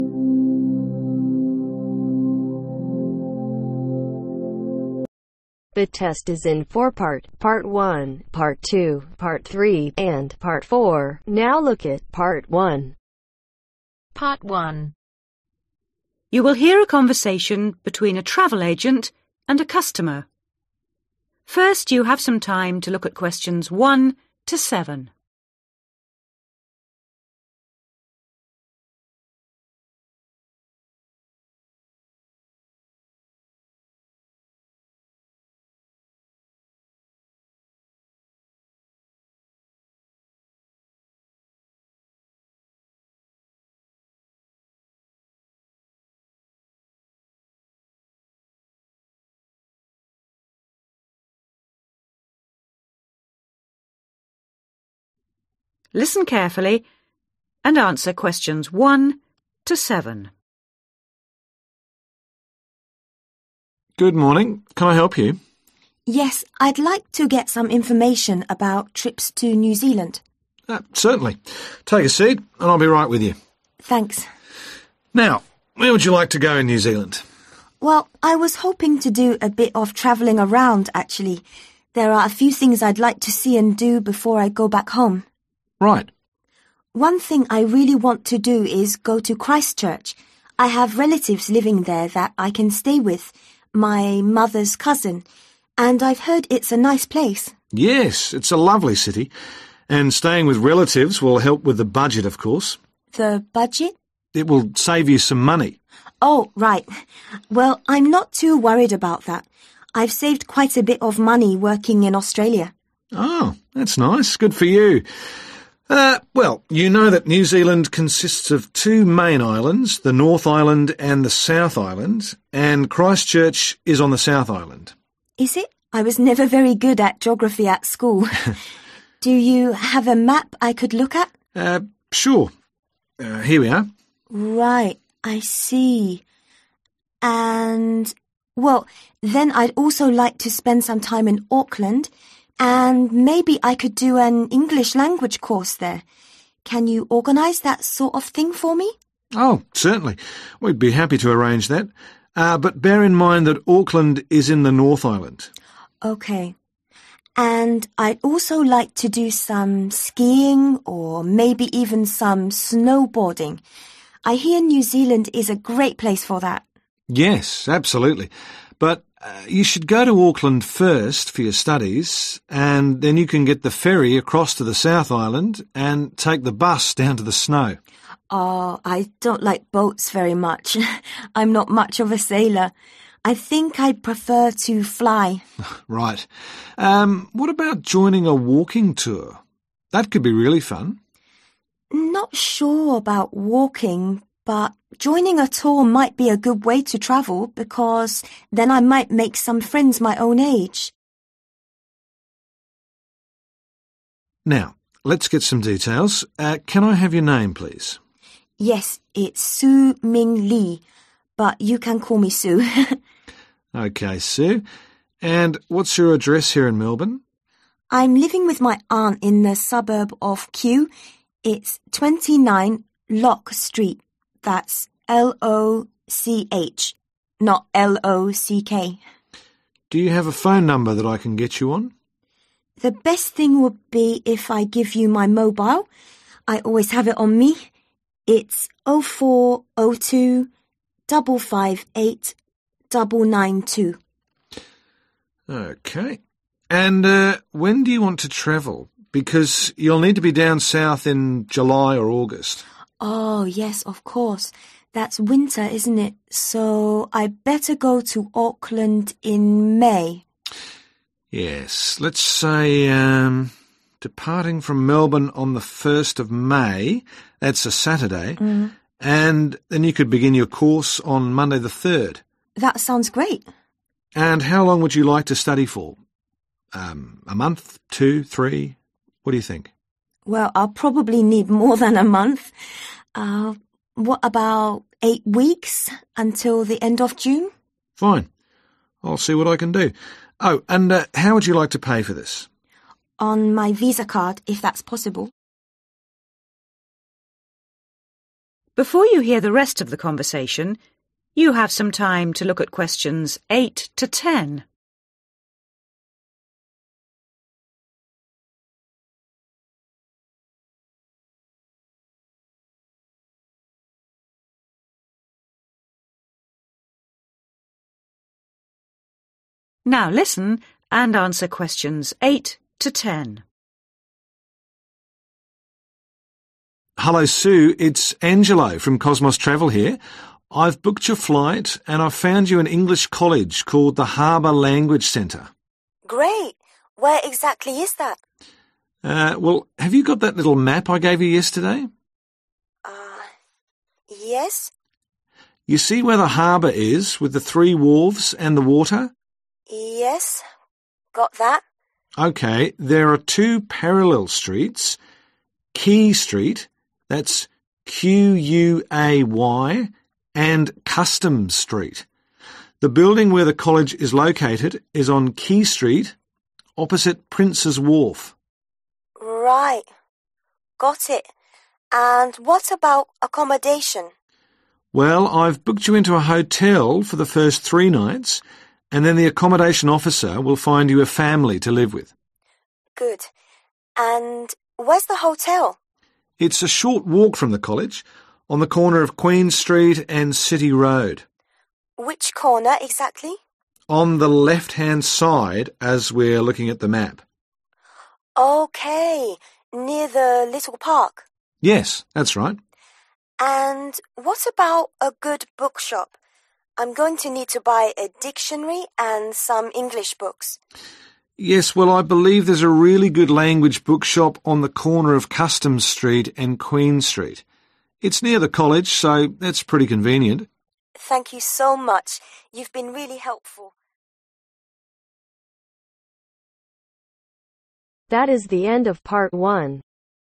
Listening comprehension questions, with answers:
Choose THREE letters A-H.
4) Address 29 (4) ............ Street Kew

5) Mobile (5) 0402 ............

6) Day and date of departure Saturday 1st (6) ............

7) Length of course (7) ............ weeks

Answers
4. LOCH
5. 558992
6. May
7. 8